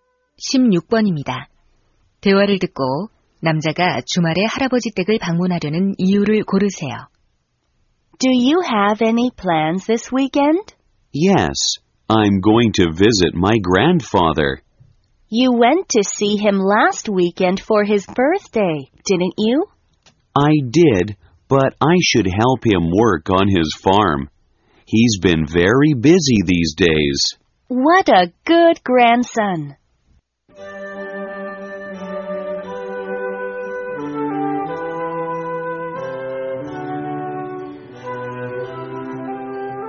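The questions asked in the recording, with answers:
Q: 대화를 듣고 남자가 주말에 할아버지 댁을 방문하려는 이유를 고르세요.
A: 농장 일을 도와드리려고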